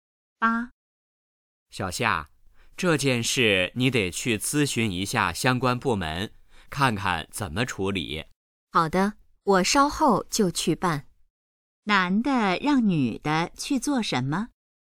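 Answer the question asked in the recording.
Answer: 去咨询相关部门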